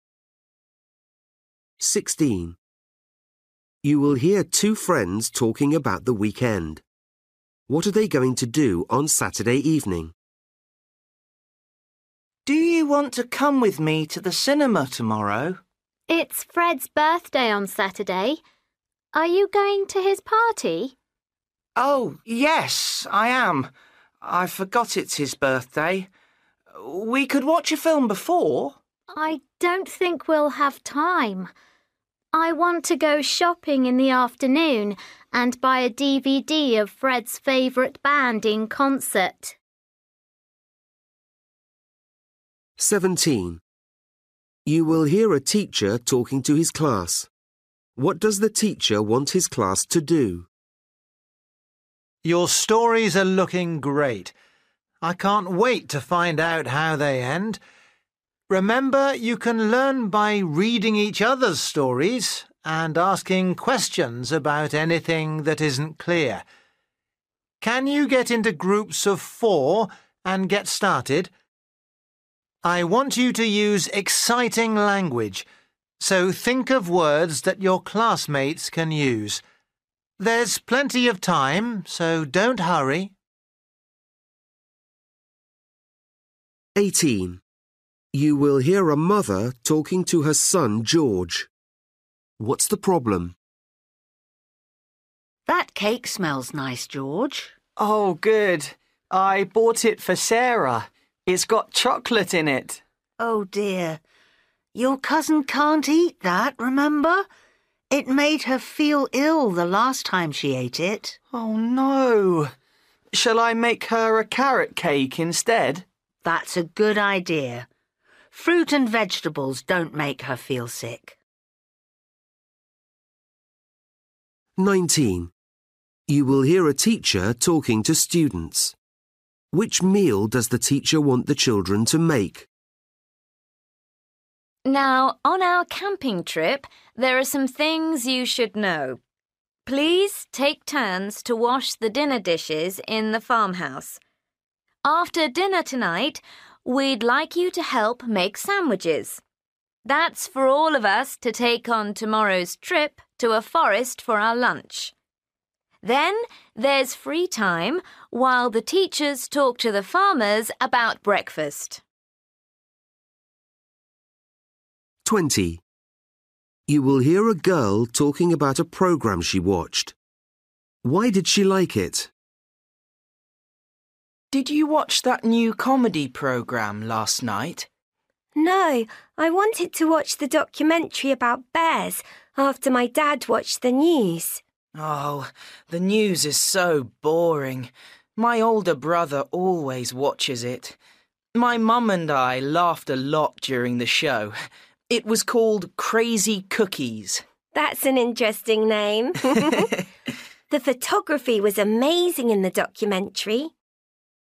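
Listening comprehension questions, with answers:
For each question, choose the correct answer.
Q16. You will hear two friends talking about the weekend. What are they going to do on Saturday evening?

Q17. You will hear a teacher talking to his class. What does the teacher want his class to do?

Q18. You will hear a mother talking to her son, George. What's the problem?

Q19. You will hear a teacher talking to students. Which meal does the teacher want the children to make?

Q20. You will hear a girl talking about a programme she watched. Why did she like it?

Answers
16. Go to Fred's birthday party
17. Work in groups of four, reading each other's stories
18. The cake has chocolate in it, which makes his cousin ill
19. Lunch (sandwiches)
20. It was funny

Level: Luyện nghe trình độ A2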